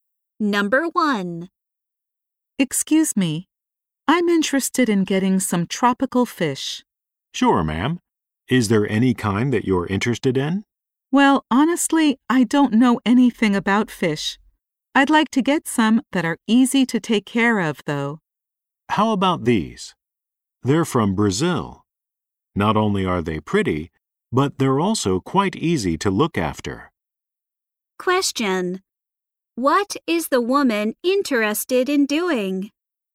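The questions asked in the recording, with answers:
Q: What is the woman interested in doing?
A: Getting some tropical fish that are easy to take care of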